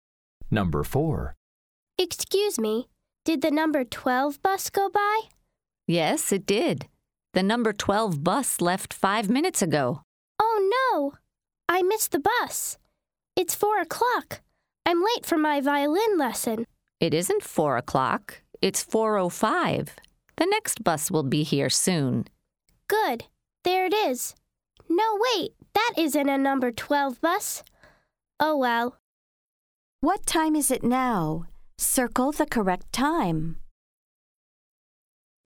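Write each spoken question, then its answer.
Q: What time is it now?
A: 4:05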